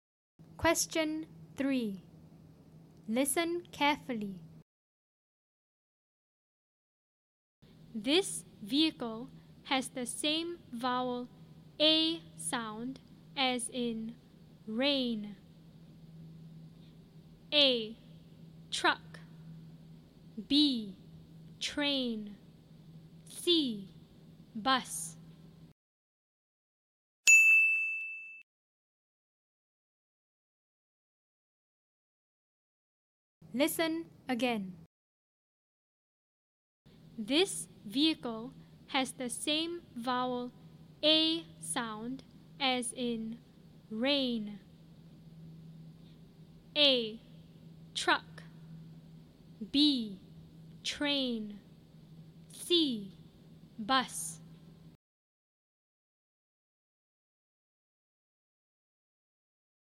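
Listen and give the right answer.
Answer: B: Train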